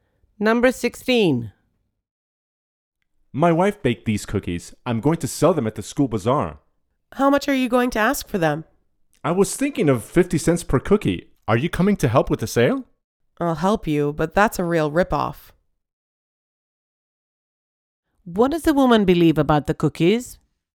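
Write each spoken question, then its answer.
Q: What does the woman believe about the cookies?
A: They are overpriced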